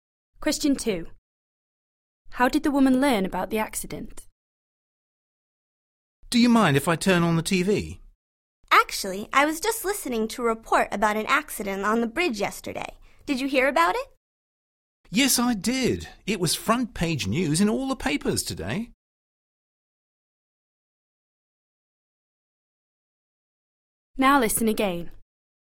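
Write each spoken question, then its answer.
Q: How did the woman learn about the accident?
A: From the newspapers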